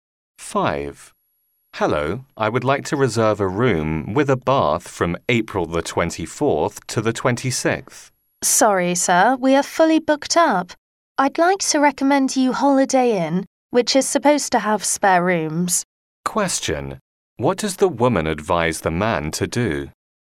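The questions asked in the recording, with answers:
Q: What does the woman advise the man to do?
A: Try the Holiday Inn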